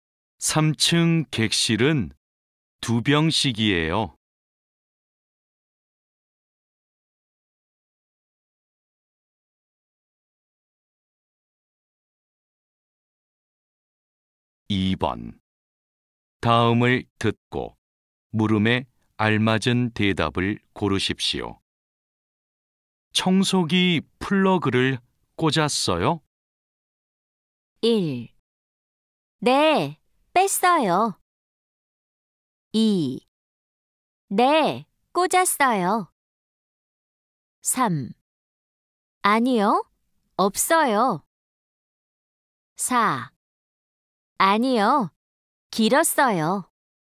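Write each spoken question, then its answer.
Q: 청소기 플러그를 꽂았어요?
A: 2: 네, 꽂았어요.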